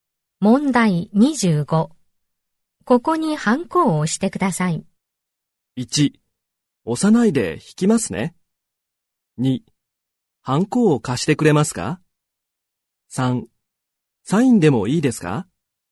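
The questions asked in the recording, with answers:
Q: ここにハンコを押してください。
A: 3: サインでもいいですか?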